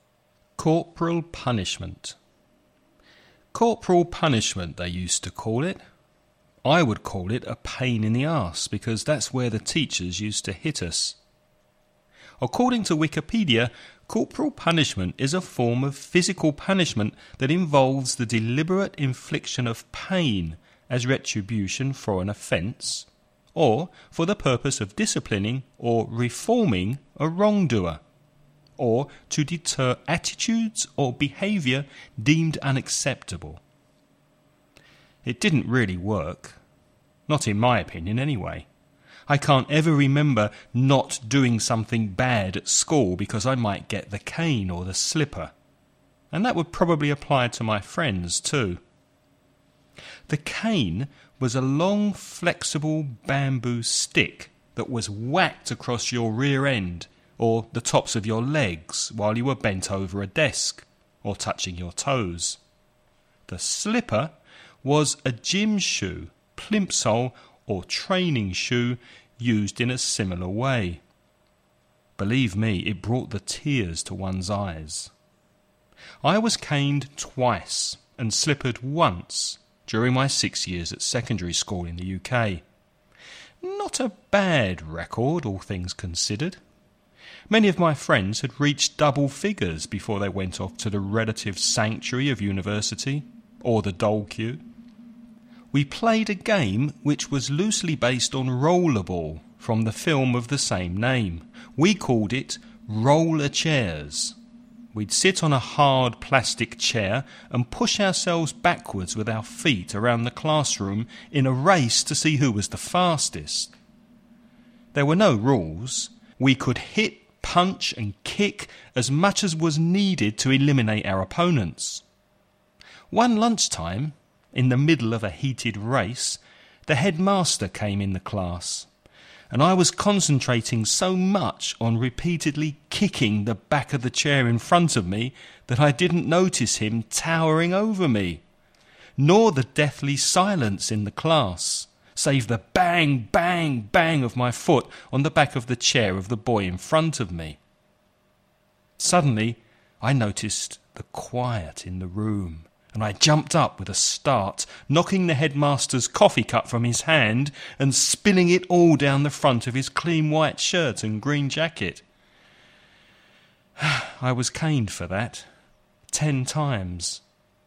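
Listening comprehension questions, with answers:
Listen and write the questions you hear.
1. According to the speaker, was the cane an effective form of punishment?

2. How many times did the speaker get 'caned' and 'slippered' during his time at secondary school?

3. Was 'Rollerchairs' a violent game?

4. Did the speaker stop the game as soon as the headmaster came into the room?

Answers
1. No, it didn't really work.
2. Caned twice and slippered once.
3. Yes, there were no rules; they could hit, punch and kick.
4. No, he didn't notice him and kept kicking the chair.

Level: nivel avanzado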